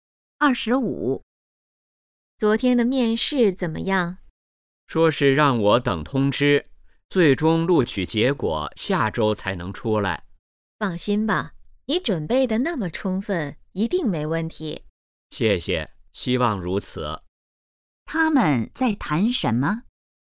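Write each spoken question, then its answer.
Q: 他们在谈什么?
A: 面试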